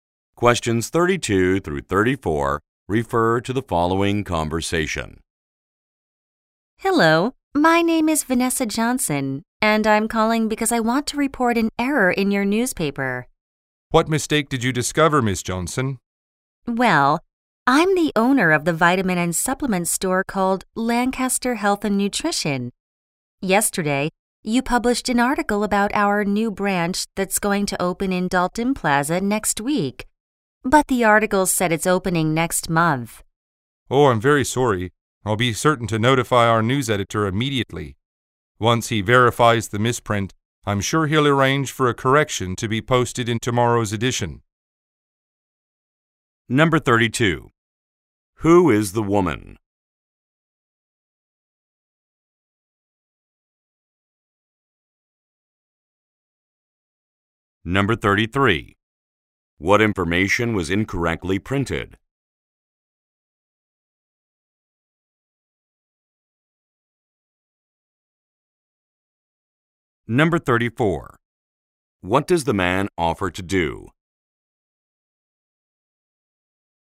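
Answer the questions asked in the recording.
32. A store owner
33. The opening date of the new branch
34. Notify the news editor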